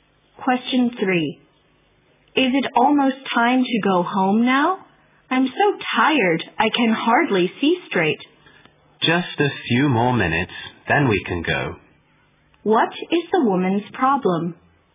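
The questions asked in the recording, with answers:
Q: What is the woman's problem?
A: She is very tired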